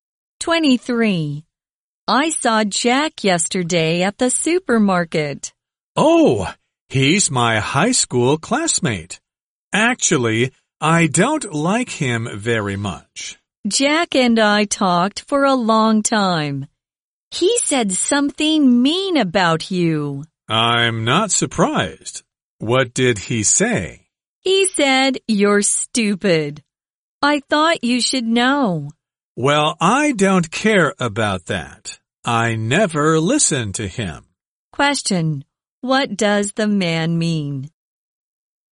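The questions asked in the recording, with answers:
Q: What does the man mean?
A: He doesn't care what Jack said about him.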